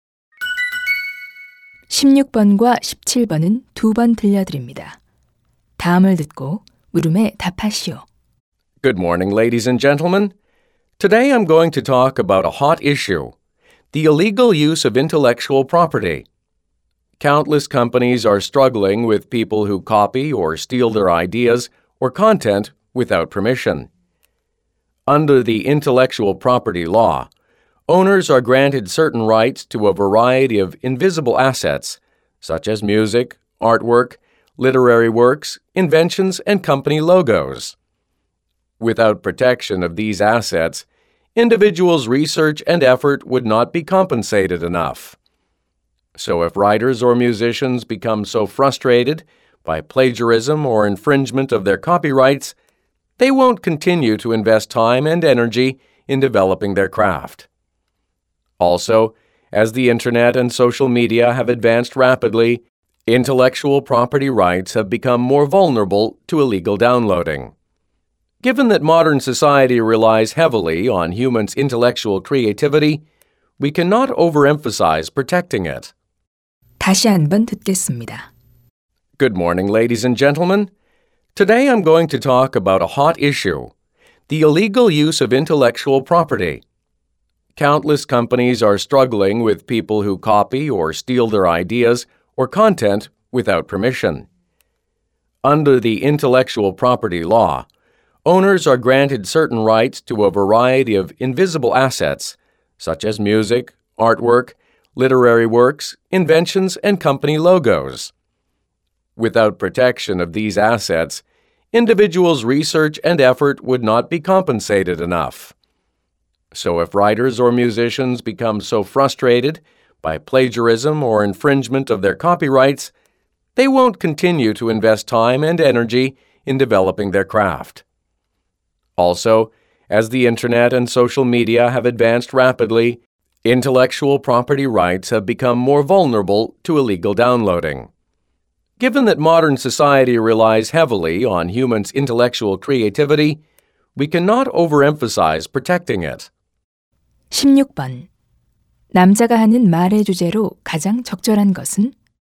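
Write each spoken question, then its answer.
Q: 남자가 하는 말의 주제로 가장 적절한 것은?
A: 지식 재산권 보호의 중요성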